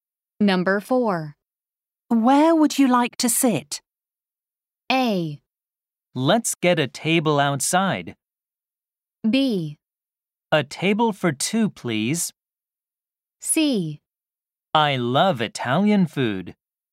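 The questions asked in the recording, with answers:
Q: Where would you like to sit?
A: A: Let's get a table outside.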